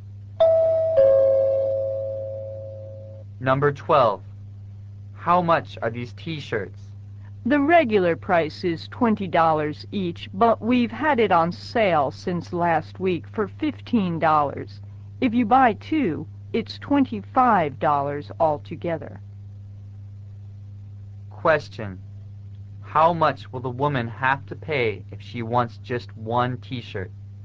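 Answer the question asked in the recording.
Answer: $15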